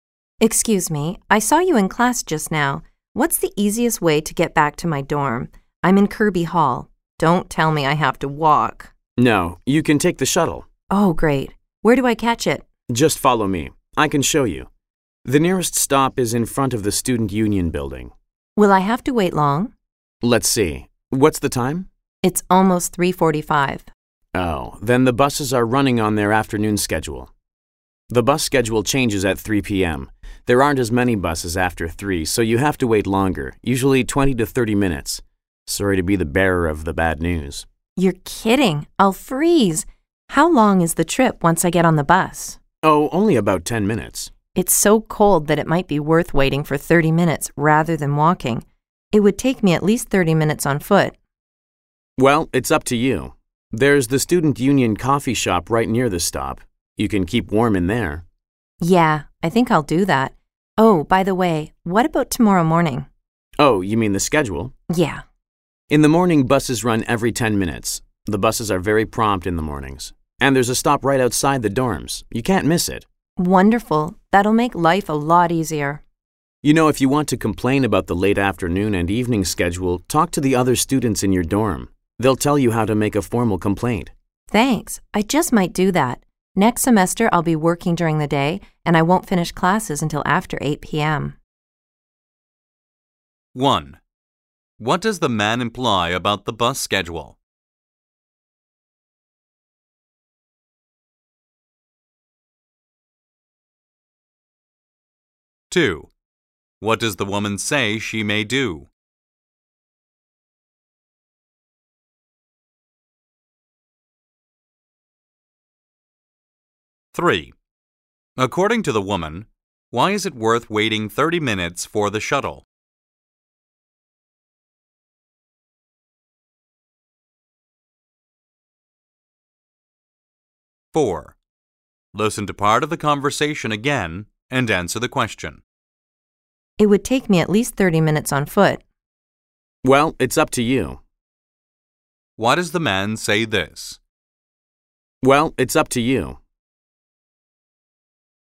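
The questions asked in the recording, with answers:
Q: What does the man imply about the bus schedule?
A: Buses run less often after 3 p.m., so there is a longer wait (20–30 minutes) in the afternoon.

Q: What does the woman say she may do?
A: Make a formal complaint about the afternoon and evening bus schedule.

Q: According to the woman, why is it worth waiting 30 minutes for the shuttle?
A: It is very cold, and walking would take at least 30 minutes anyway.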